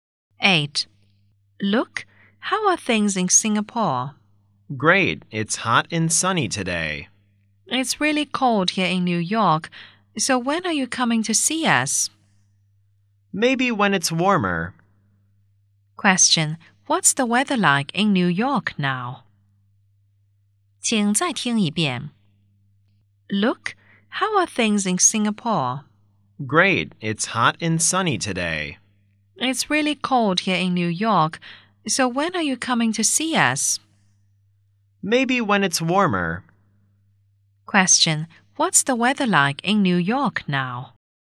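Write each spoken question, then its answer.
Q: what's the weather like in New York now?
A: Cold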